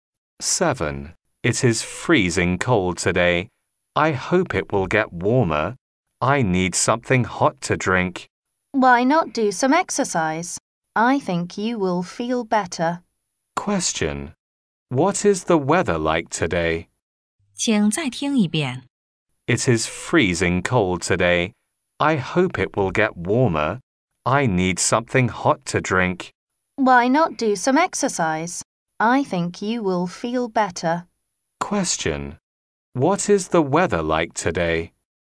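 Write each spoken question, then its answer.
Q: What is the weather like today?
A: Freezing cold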